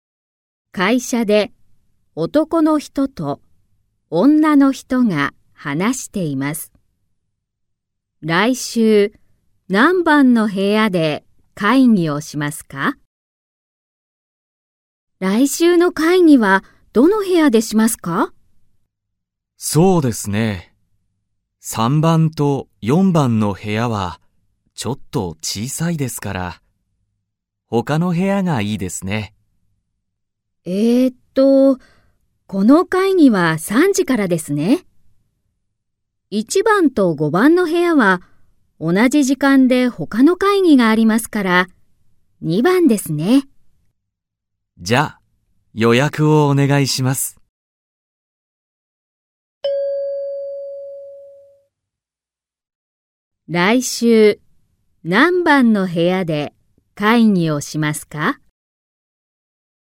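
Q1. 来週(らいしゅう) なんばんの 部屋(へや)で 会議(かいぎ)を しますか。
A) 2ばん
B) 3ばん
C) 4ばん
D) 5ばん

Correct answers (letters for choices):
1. A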